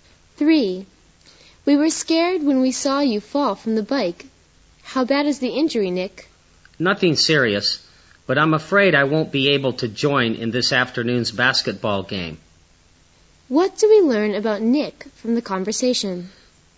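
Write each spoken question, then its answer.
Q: What do we learn about Nick from the conversation?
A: He won't be able to play in this afternoon's basketball game.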